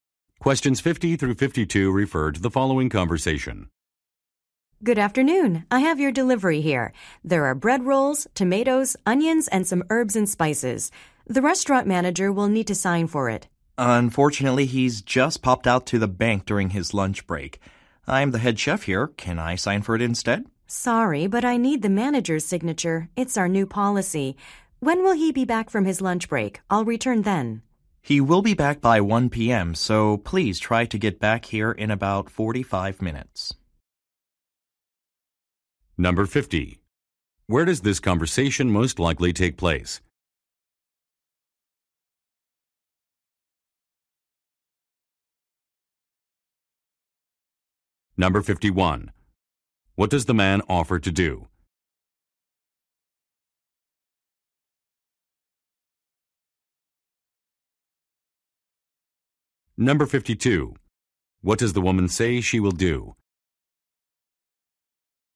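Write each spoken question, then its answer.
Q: Where does this conversation most likely take place?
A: At a restaurant

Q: What does the man offer to do?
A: Sign for the delivery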